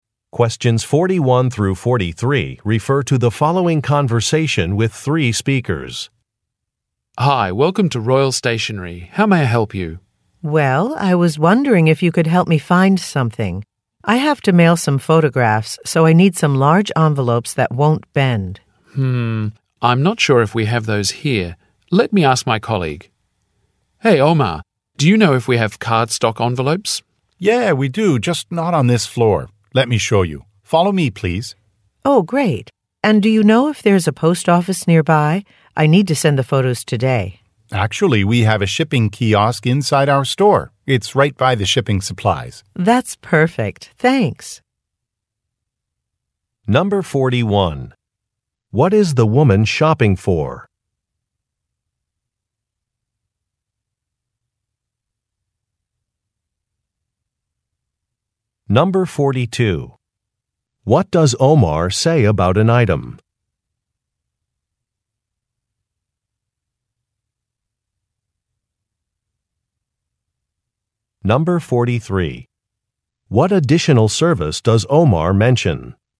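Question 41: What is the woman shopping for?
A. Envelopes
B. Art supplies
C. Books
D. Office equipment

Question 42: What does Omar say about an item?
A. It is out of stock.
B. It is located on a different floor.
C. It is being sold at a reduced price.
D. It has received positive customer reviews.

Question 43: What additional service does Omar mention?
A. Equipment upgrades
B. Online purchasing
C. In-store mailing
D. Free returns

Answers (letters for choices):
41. A
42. B
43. C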